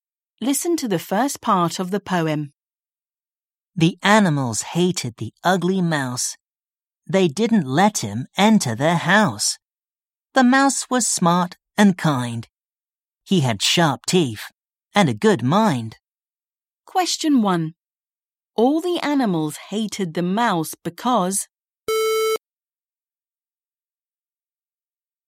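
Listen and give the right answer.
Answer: he was ugly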